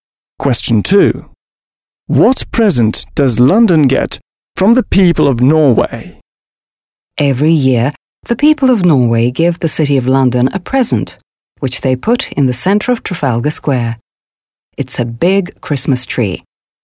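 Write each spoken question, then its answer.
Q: What present does London get from the people of Norway?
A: A big Christmas tree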